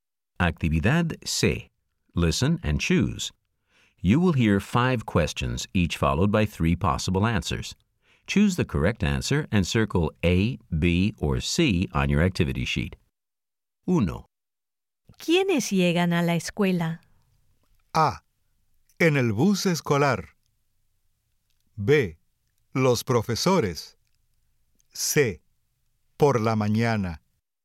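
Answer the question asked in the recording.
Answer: B: Los profesores.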